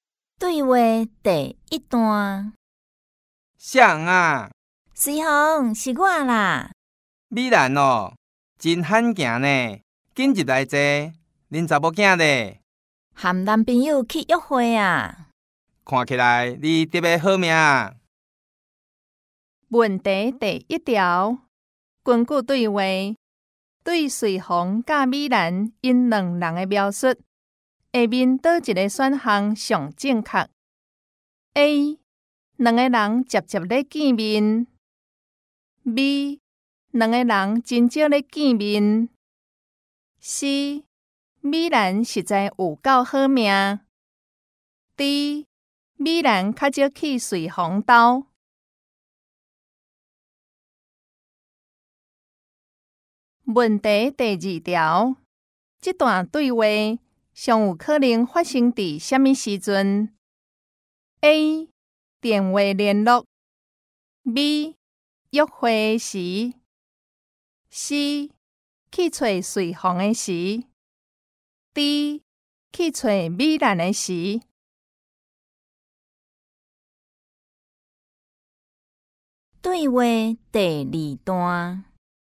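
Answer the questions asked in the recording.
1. B: 两个人真少咧见面
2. C: 去找随风的时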